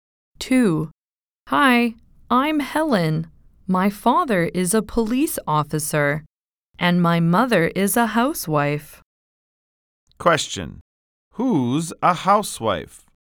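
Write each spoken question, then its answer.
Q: Who's a housewife?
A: Helen's mother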